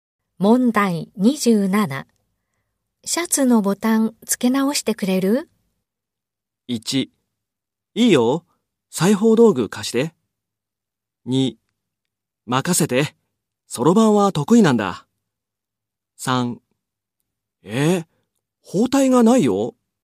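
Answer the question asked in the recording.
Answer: 1: いいよ、裁縫道具貸して。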